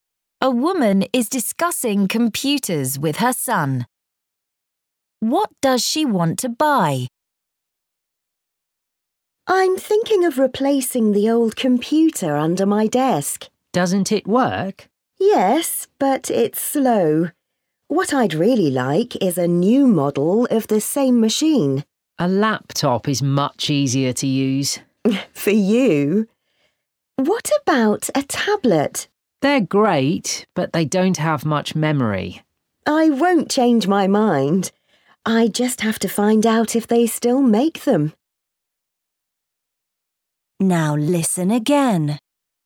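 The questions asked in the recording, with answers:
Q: What does she want to buy?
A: A new model of her old desktop computer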